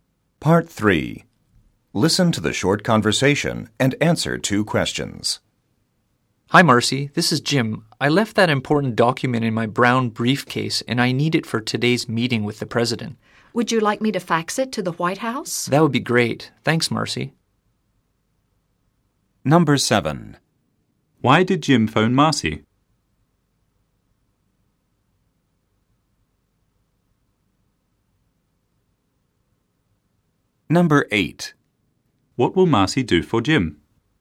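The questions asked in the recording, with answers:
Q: Why did Jim phone Marcy?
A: He left an important document in his briefcase and needs it for a meeting.

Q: What will Marcy do for Jim?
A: Fax the document to the White House.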